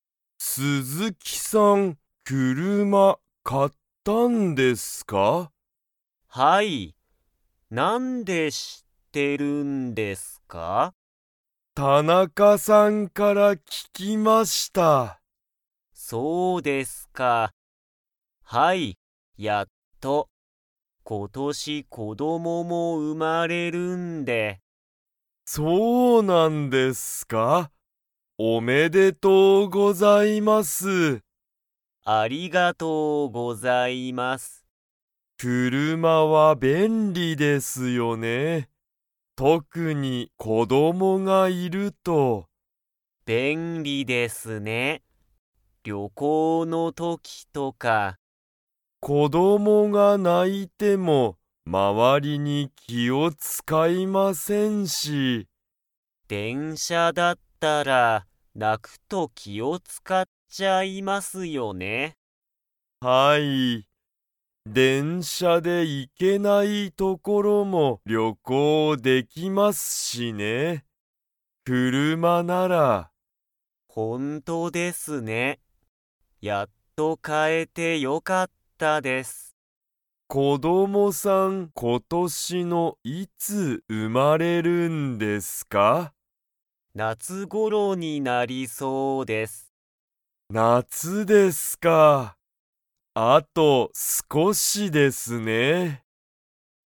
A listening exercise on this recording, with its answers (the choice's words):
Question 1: 鈴木すずきさんは、何なにを買かいましたか?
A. 料理りょうり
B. 車くるま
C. 旅行りょこう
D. 電車でんしゃ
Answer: 車くるま

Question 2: 鈴木すずきさんの子供こどもが生うまれるのは、今年ことしの夏頃なつごろに 。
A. なりそう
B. ならなそう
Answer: なりそう

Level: Level 3